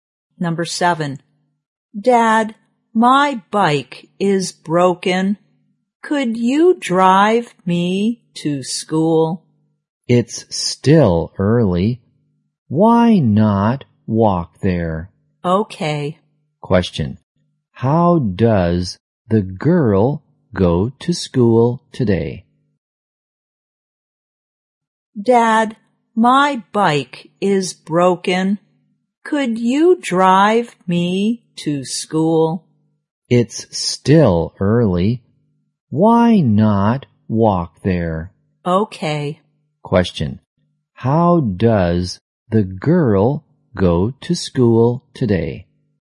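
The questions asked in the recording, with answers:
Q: how does the girl go to school today?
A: She walks.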